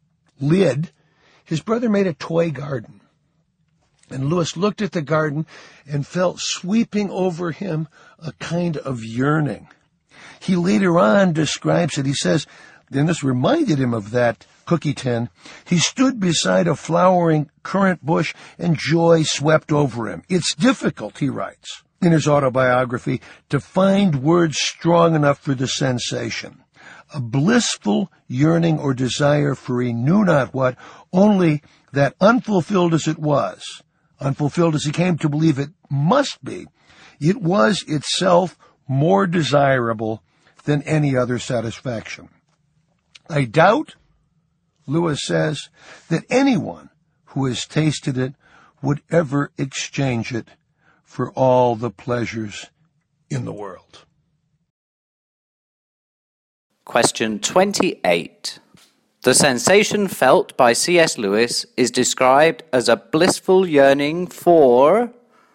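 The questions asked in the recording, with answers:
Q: The sensation felt by C.S. Lewis is described as a blissful yearning for...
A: he knew not what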